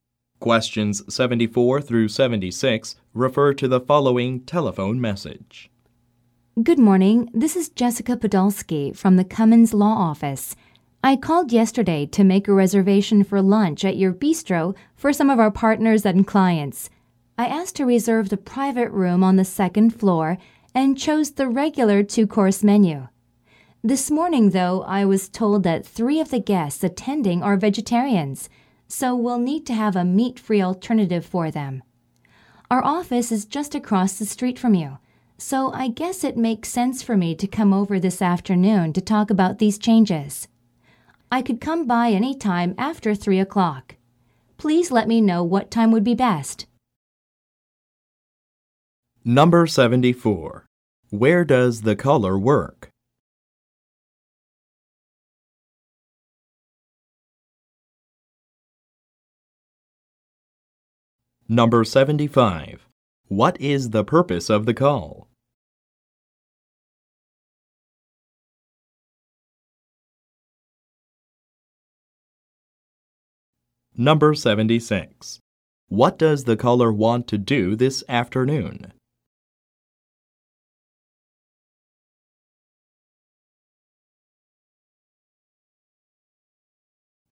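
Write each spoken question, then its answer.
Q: Where does the caller work?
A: At a law office (Cummins Law Office)

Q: What is the purpose of the call?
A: To change a lunch reservation to add a vegetarian option

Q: What does the caller want to do this afternoon?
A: Visit the bistro to talk about the changes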